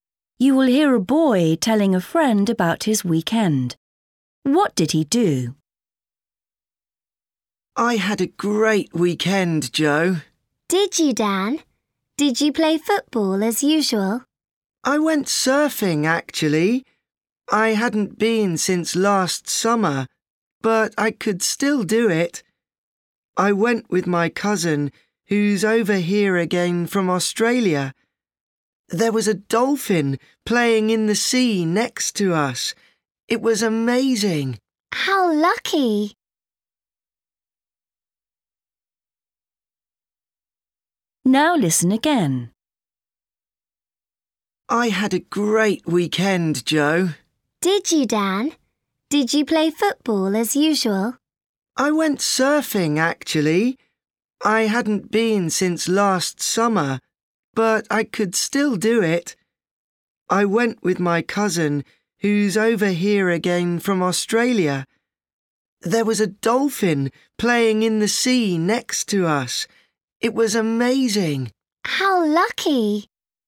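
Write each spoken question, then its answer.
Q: What did he do?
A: He went surfing with his cousin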